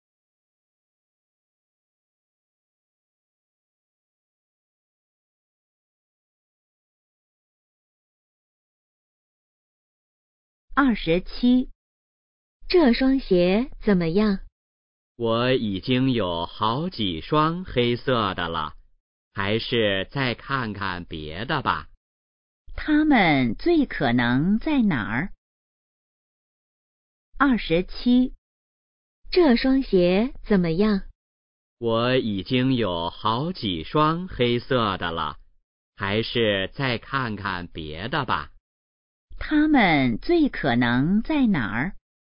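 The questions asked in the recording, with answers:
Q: 他们最可能在哪儿?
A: 商店(鞋店)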